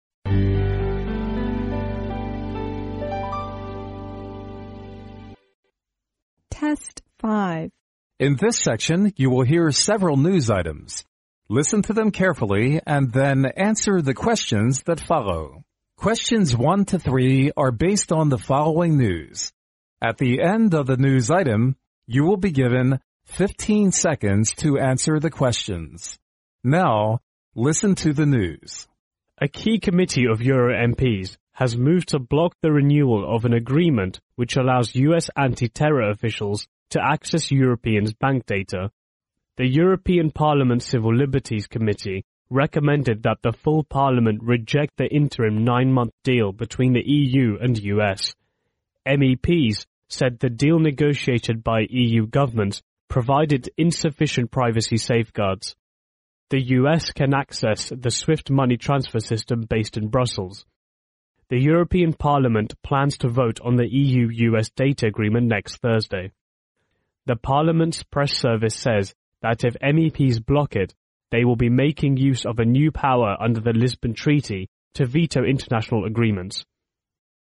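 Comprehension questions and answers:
Now listen to the news.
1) What is the decision of the Euro MPs which allows US officials to access Europeans,bank data?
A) Stopping renewing an agreement.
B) Blocking an agreement.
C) Renewing an agreement.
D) Blocking the renewal of an contract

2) Why did the committee recommend a rejection against the interim nine-month deal between the EU and US?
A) Because it provided sufficient privacy safeguards.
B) Because it can not protect privacy sufficiently.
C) Because it provided insufficient safeguards.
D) Because it failed to safeguard people's interests.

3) MEPs try to access their veto power under_____.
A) the Swift money transfer system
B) the Brussels Treaty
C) the Lisbon Treaty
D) the Swift system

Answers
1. A
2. B
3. C

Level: 英语四级

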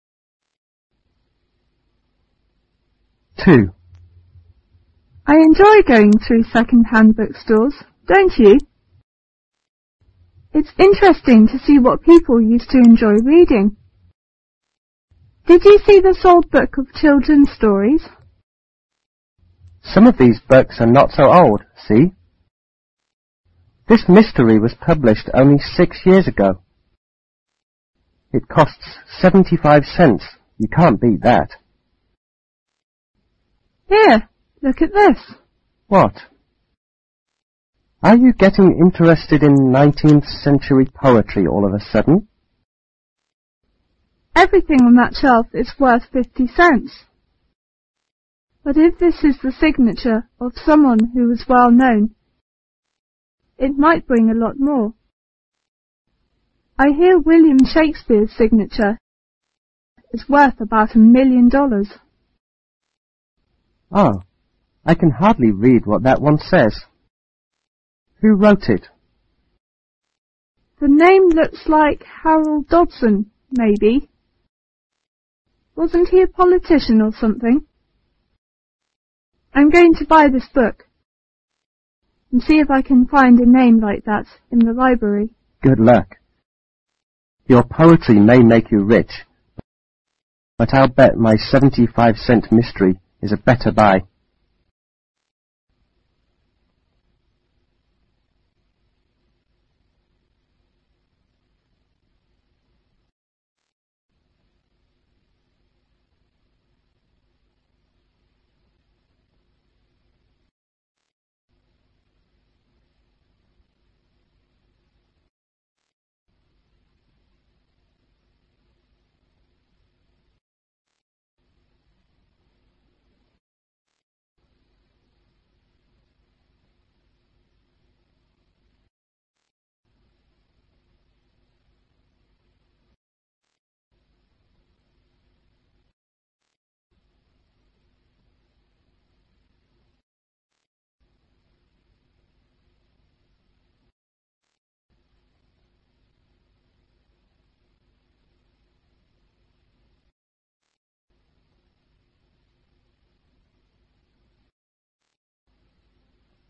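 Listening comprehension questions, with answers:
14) Where is the conservation taking place?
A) ln a library.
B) ln a school.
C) In a bookstore.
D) ln a publisher's office.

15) Why does the woman mention Shakespeare?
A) He gave gifts to millions of people.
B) He was a very wealthy man in his time.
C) A sample of his writing is worth a lot of money.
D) She has a copy of one of his books.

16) What does the woman intend to do later on?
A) to talk to some politicians.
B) To sign her name in the book.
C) to sell some of her books.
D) to do some research.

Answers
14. C
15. C
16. D

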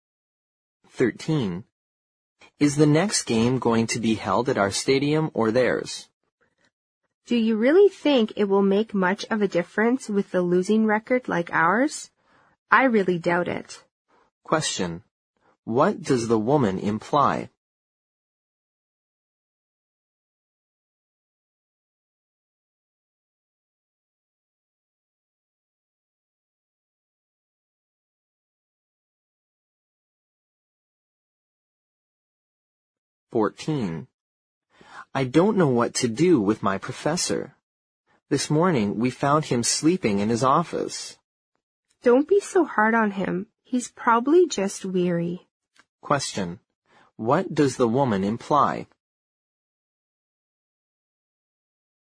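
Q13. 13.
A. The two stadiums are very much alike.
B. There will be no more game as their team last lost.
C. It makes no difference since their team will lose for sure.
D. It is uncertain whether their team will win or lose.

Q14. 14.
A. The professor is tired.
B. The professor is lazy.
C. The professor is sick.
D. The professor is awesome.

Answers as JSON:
{"13": "C", "14": "A"}

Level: 六级

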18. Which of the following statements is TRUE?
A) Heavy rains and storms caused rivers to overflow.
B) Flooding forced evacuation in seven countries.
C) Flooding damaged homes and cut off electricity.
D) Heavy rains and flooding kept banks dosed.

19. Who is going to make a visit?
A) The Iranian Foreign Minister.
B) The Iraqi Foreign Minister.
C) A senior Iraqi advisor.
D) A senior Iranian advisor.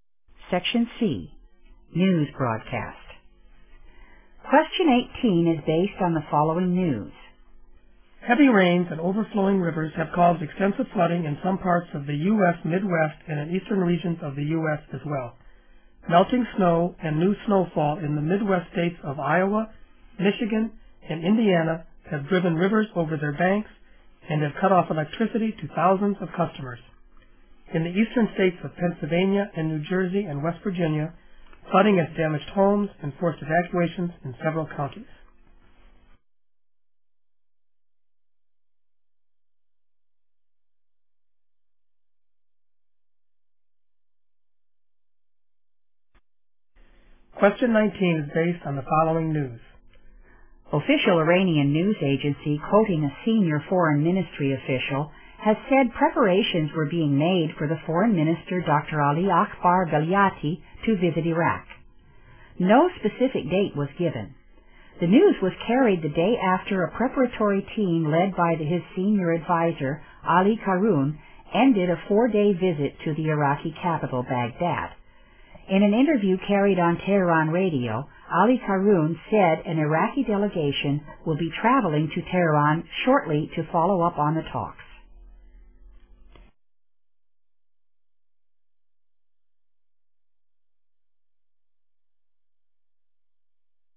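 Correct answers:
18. C
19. A

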